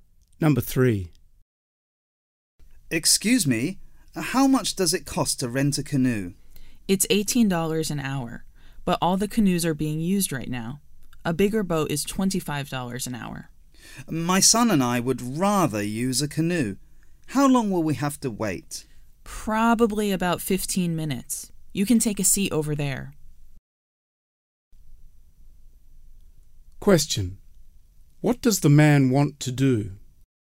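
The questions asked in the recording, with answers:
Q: What does the man want to do?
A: Rent a canoe.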